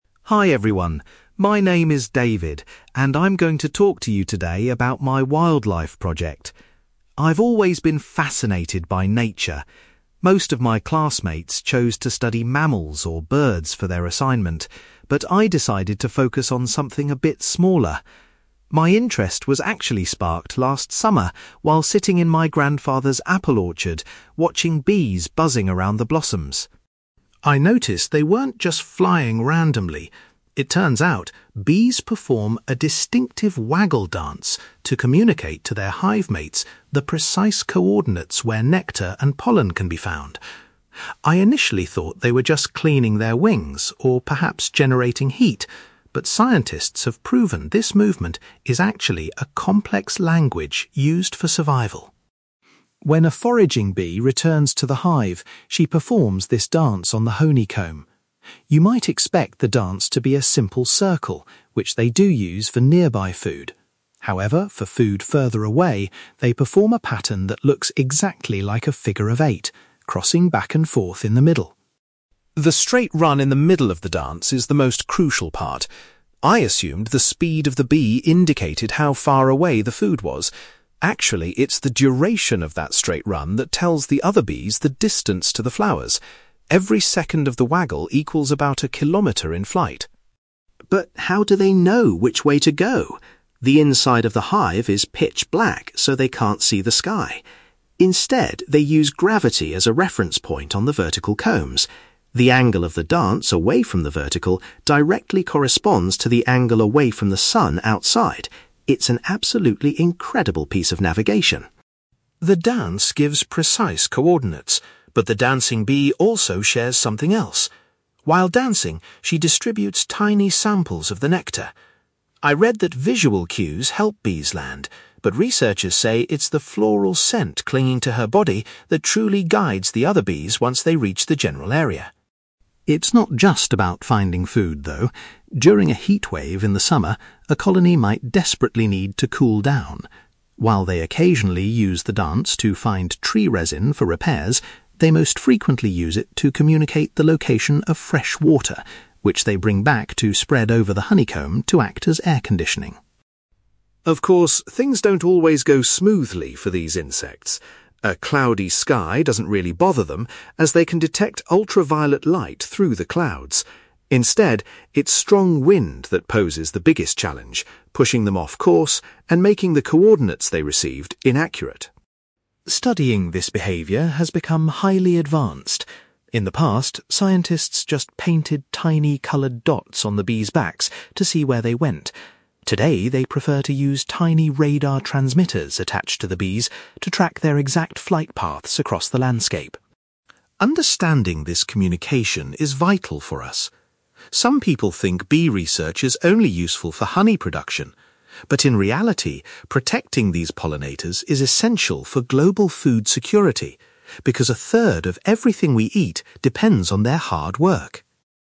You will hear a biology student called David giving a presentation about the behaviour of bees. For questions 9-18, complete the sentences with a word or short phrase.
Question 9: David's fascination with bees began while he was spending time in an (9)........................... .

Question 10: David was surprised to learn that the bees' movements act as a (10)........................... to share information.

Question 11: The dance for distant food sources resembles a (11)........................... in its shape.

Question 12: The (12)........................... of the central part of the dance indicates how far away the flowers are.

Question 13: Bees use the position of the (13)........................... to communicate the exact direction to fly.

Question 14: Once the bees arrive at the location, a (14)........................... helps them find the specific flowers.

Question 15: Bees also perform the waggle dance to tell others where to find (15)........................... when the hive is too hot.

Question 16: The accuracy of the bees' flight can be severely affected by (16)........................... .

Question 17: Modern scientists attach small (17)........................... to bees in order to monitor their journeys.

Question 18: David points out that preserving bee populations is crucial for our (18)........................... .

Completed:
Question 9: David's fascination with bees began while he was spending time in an apple orchard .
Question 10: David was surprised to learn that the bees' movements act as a language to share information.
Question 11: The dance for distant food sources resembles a figure of eight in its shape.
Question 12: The duration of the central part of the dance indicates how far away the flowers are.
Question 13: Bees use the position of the sun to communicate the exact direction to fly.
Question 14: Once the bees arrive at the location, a floral scent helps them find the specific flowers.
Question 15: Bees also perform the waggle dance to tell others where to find fresh water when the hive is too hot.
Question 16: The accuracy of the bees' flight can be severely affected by strong wind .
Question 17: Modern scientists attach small radar transmitters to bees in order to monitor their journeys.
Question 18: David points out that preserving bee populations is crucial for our food security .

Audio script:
David: Hi everyone, my name is David, and I'm going to talk to you today about my wildlife project. I've always been fascinated by nature. Most of my classmates chose to study mammals or birds for their assignment, but I decided to focus on something a bit smaller. My interest was actually sparked last summer while sitting in my grandfather's apple orchard, watching bees buzzing around the blossoms.
I noticed they weren't just flying randomly. It turns out, bees perform a distinctive waggle dance to communicate to their hive mates the precise coordinates where nectar and pollen can be found. I initially thought they were just cleaning their wings or perhaps generating heat, but scientists have proven this movement is actually a complex language used for survival.
When a foraging bee returns to the hive, she performs this dance on the honeycomb. You might expect the dance to be a simple circle, which they do use for nearby food. However, for food further away, they perform a pattern that looks exactly like a figure of eight, crossing back and forth in the middle.
The straight run in the middle of the dance is the most crucial part. I assumed the speed of the bee indicated how far away the food was. Actually, it's the duration of that straight run that tells the other bees the distance to the flowers. Every second of the waggle equals about a kilometre in flight.
But how do they know which way to go? The inside of the hive is pitch black, so they can't see the sky. Instead, they use gravity as a reference point on the vertical combs. The angle of the dance away from the vertical directly corresponds to the angle away from the sun outside. It's an absolutely incredible piece of navigation.
The dance gives precise coordinates, but the dancing bee also shares something else. While dancing, she distributes tiny samples of the nectar. I read that visual cues help bees land, but researchers say it's the floral scent clinging to her body that truly guides the other bees once they reach the general area.
It's not just about finding food, though. During a heatwave in the summer, a colony might desperately need to cool down. While they occasionally use the dance to find tree resin for repairs, they most frequently use it to communicate the location of fresh water, which they bring back to spread over the honeycomb to act as air conditioning.
Of course, things don't always go smoothly for these insects. A cloudy sky doesn't really bother them, as they can detect ultraviolet light through the clouds. Instead, it's strong wind that poses the biggest challenge, pushing them off course and making the coordinates they received inaccurate.
Studying this behaviour has become highly advanced. In the past, scientists just painted tiny coloured dots on the bees' backs to see where they went. Today, they prefer to use tiny radar transmitters attached to the bees to track their exact flight paths across the landscape.
Understanding this communication is vital for us. Some people think bee research is only useful for honey production. But in reality, protecting these pollinators is essential for global food security, because a third of everything we eat depends on their hard work.

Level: B2